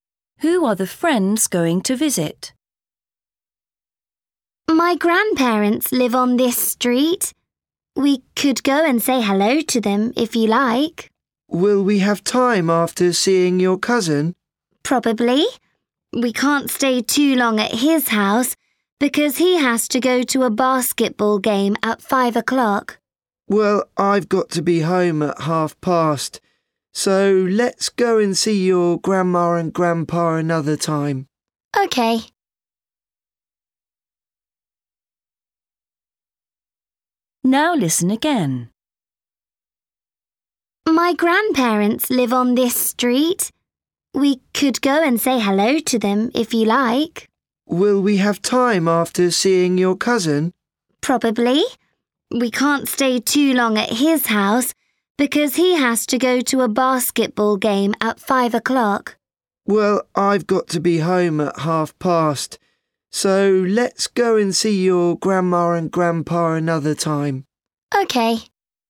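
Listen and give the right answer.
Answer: the cousin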